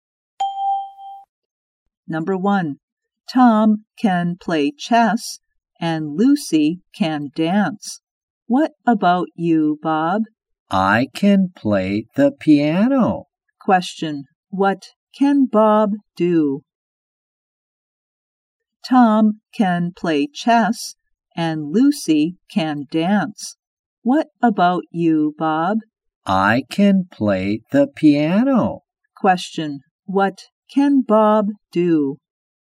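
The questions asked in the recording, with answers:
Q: Question, what can Bob do?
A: He can play the piano.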